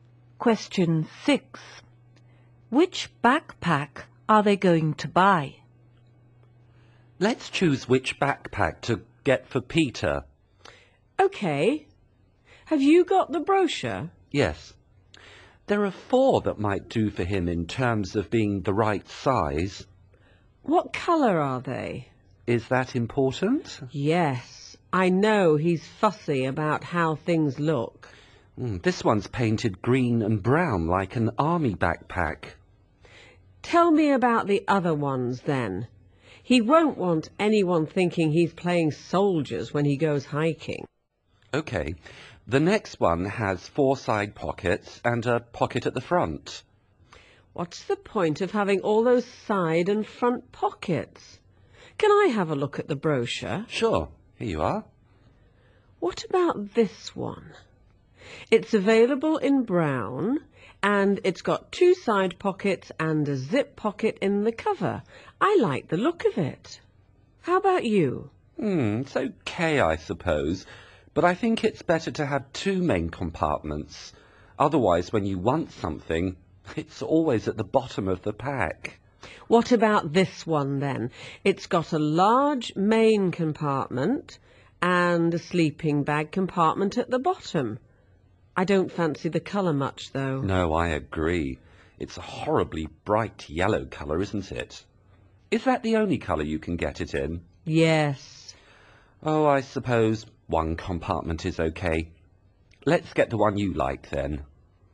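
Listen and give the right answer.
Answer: The brown one with 2 side pockets and a zip pocket in the cover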